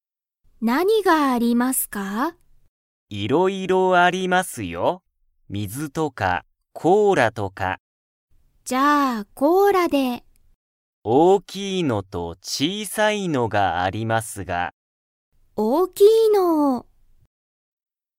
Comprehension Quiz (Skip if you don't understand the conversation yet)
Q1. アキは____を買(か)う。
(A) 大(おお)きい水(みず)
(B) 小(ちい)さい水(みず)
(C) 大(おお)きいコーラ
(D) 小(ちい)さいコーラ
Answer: (C) 大(おお)きいコーラ

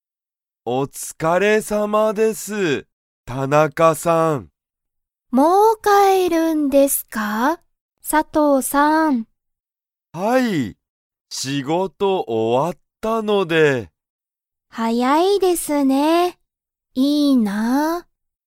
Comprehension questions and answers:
佐藤(さとう)さんは____が終(お)わった。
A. 映画(えいが)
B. 学校(がっこう)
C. 音楽おんがく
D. 仕事(しごと)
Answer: D. 仕事(しごと)

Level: Level 1

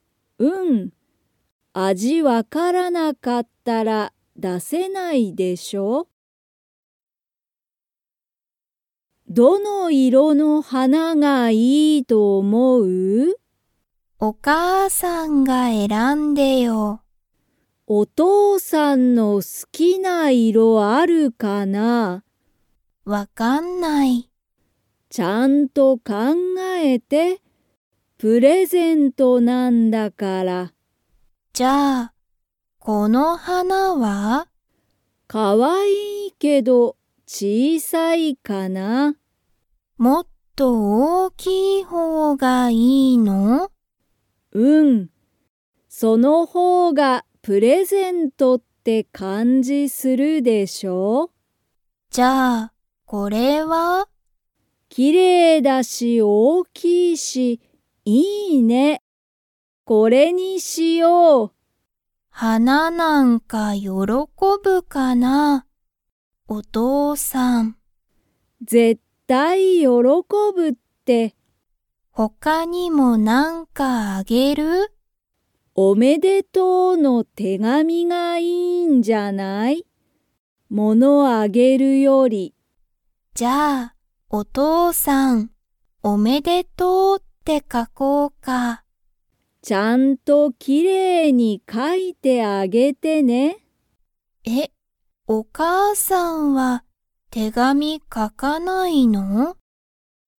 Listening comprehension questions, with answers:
Comprehension Quiz (Skip if you don't understand the conversation yet)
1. 花はなの方ほうがプレゼントって感かんじがする。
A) 小ちいさい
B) 大おおきい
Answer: B) 大おおきい

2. 二人ふたりは、花はなの他ほかに何なにをあげますか?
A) 料理りょうり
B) バッグ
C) 手紙てがみ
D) 何なにもあげない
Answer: C) 手紙てがみ

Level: Level 3

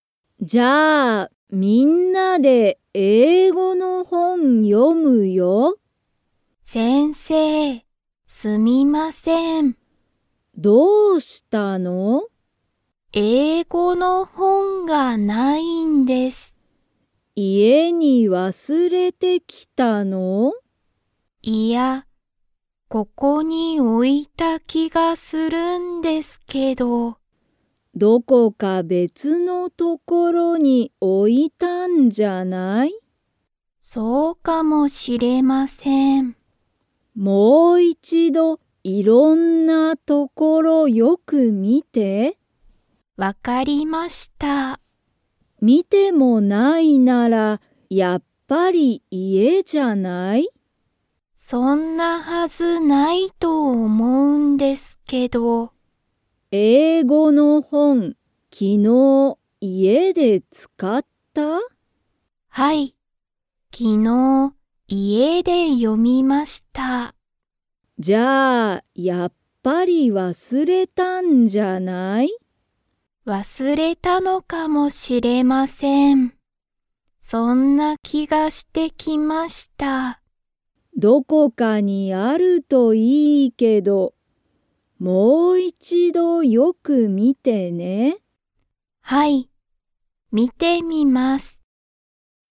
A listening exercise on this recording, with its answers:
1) ゆきは、今(いま)、英語(えいご)の本(ほん)がありますか?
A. はい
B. いいえ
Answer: B. いいえ

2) ゆきは昨日(きのう)、その本(ほん)を____で読(よ)んだ。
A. 学校(がっこう)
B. 仕事(しごと)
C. 大学(だいがく)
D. 家(いえ)))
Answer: D. 家(いえ)))

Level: Level 2

